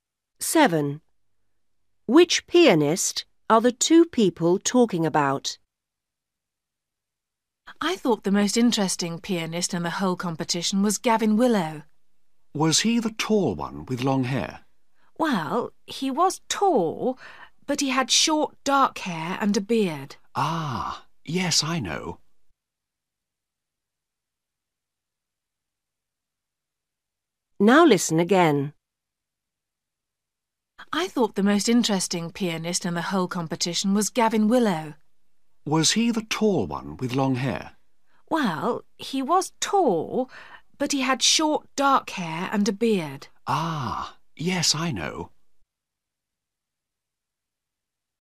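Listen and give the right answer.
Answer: Gavin Willow, the tall one with short dark hair and a beard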